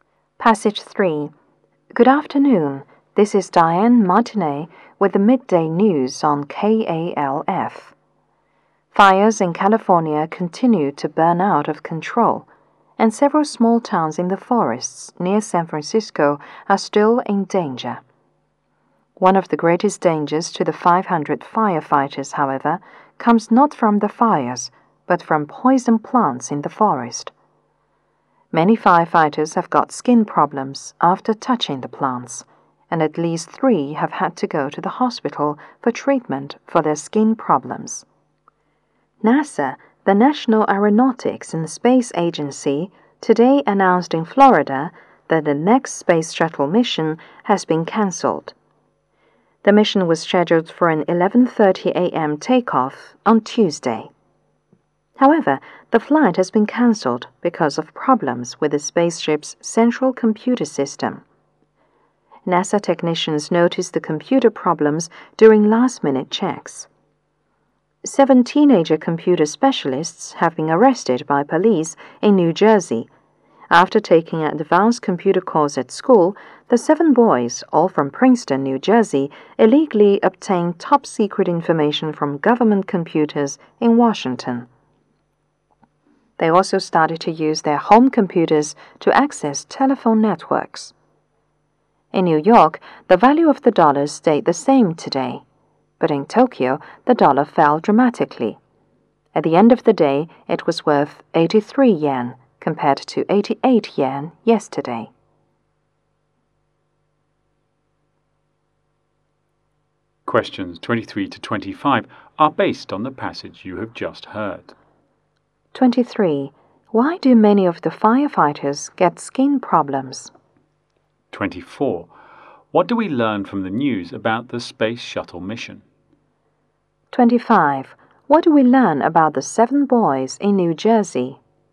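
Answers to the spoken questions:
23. They touched poison plants in the forest.
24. It was cancelled because of problems with the spaceship's central computer system.
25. They illegally got top-secret information from government computers.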